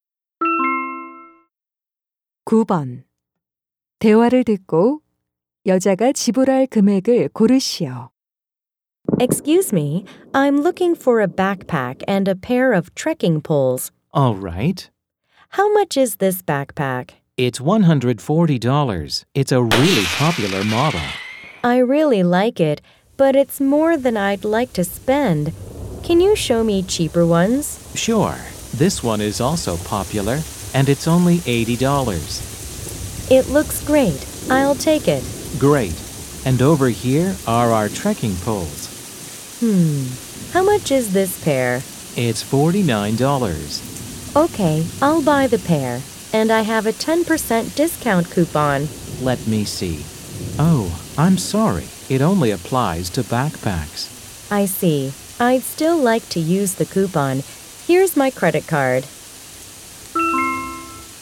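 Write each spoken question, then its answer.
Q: 대화를 듣고 여자가 지불할 금액을 고르시오.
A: $121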